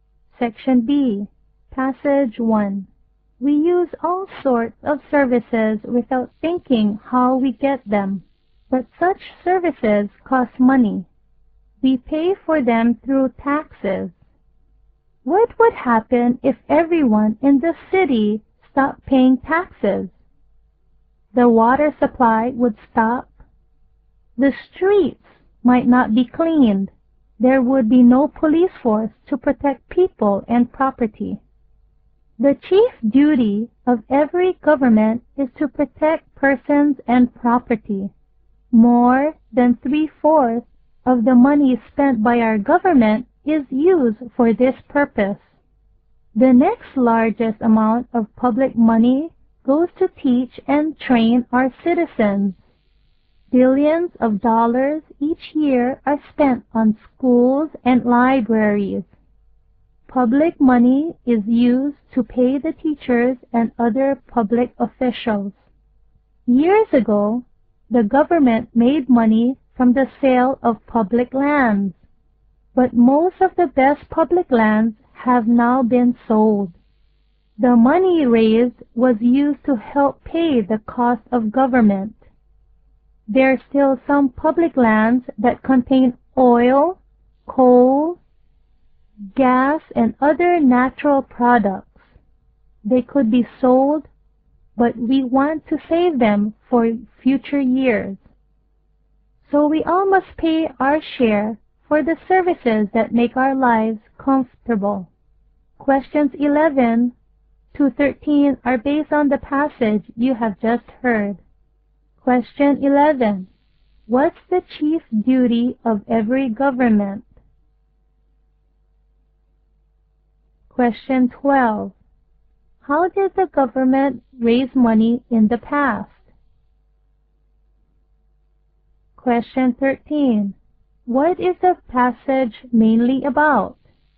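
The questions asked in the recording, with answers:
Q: What's the chief duty of every government?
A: To protect persons and property

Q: How did the government raise money in the past?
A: By selling public lands

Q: What is the passage mainly about?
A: Why citizens must pay taxes for public services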